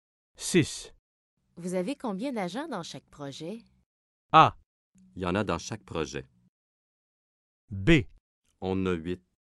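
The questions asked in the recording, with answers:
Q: Vous avez combien d'agents dans chaque projet?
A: B: On a 8.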